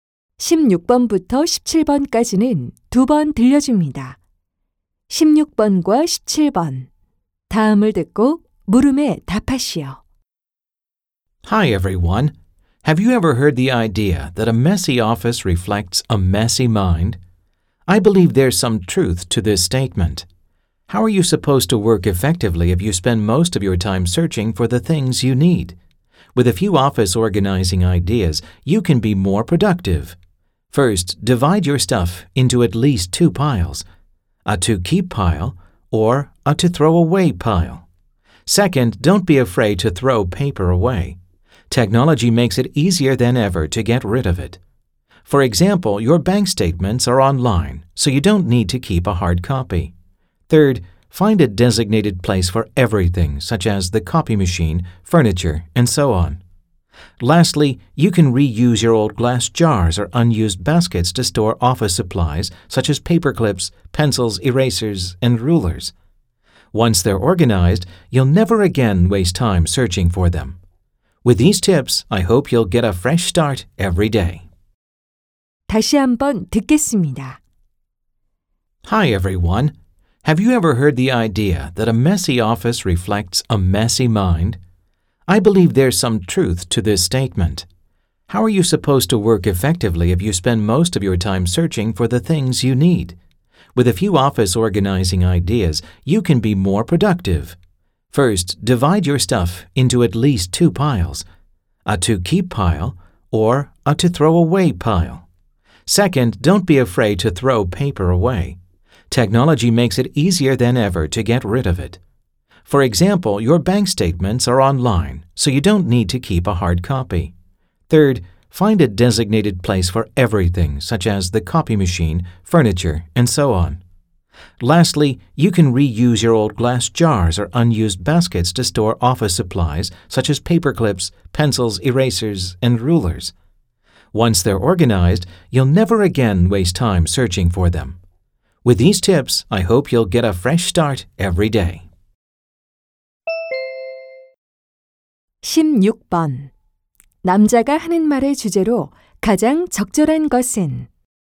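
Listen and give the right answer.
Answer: 사무실을 정리하는 방법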